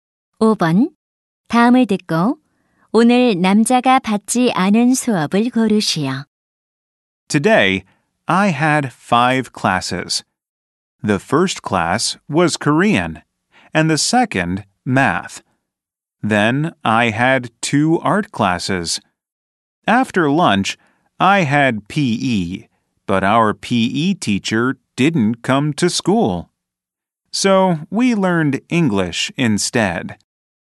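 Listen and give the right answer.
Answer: 체육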